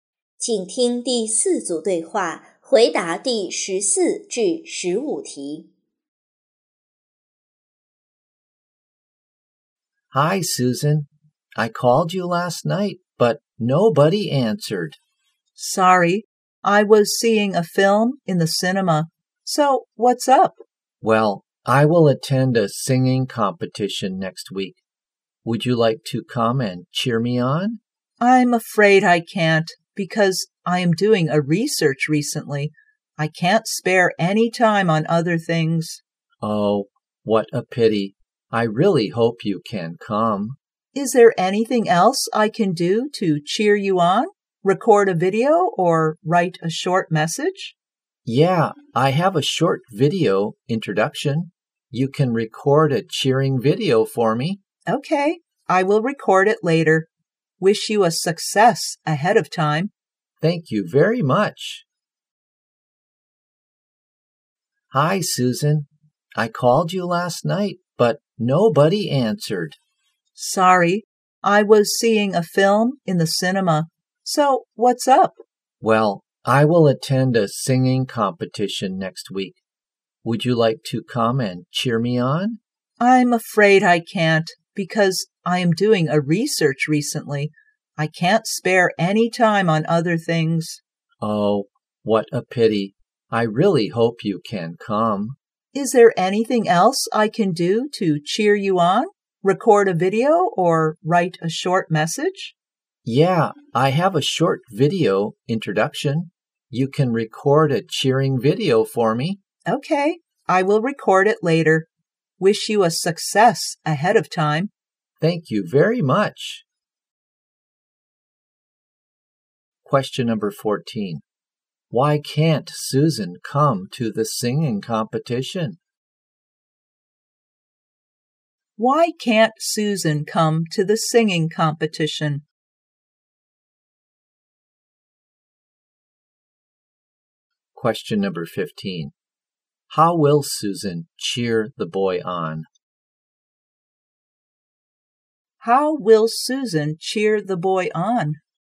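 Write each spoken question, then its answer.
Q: Why can't Susan come to the singing competition?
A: She is doing a research

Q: How will Susan cheer the boy on?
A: By recording a cheering video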